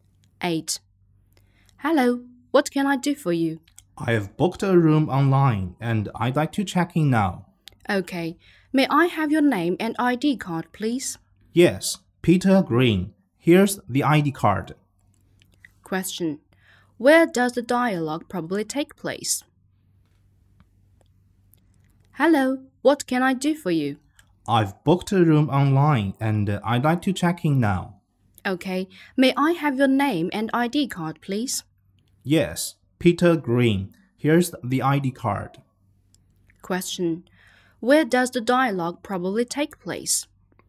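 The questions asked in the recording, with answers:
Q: Where does the dialogue probably take place?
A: At a hotel.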